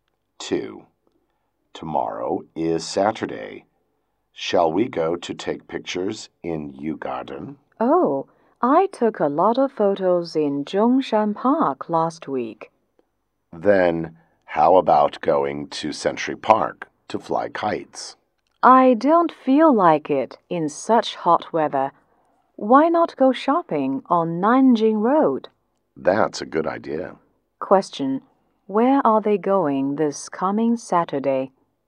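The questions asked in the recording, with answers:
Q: Where are they going this coming Saturday?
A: Nanjing Road, to go shopping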